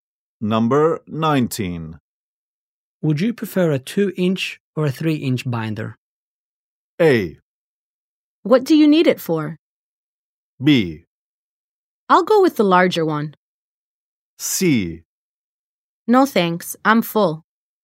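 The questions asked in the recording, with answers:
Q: Would you prefer a 2-inch or a 3-inch binder?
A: B: I'll go with the larger one.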